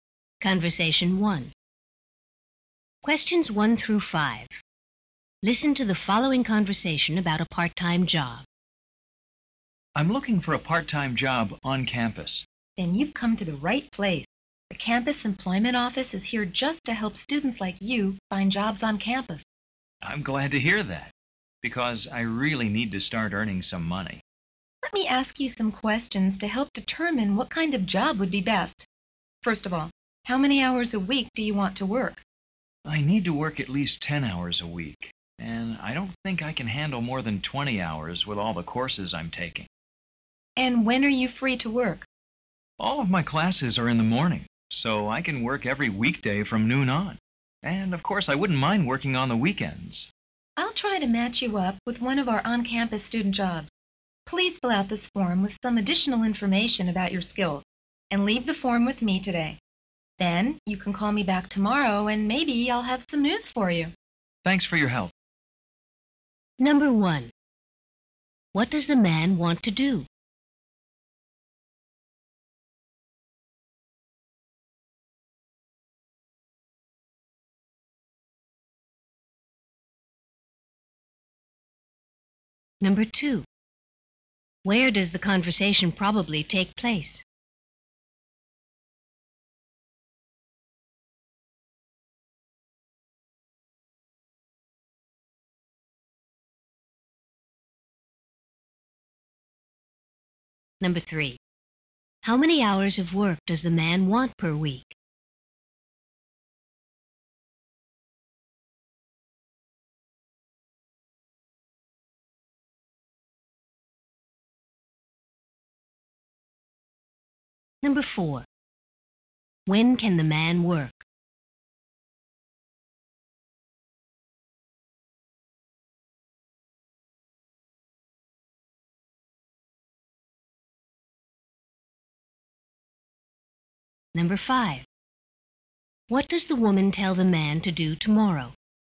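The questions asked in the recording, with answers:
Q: What does the man want to do?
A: Find a part-time job on campus

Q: Where does the conversation probably take place?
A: At the campus employment office

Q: How many hours of work does the man want per week?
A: Between 10 and 20 hours

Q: When can the man work?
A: Weekday afternoons from noon on, and weekends

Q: What does the woman tell the man to do tomorrow?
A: Call her back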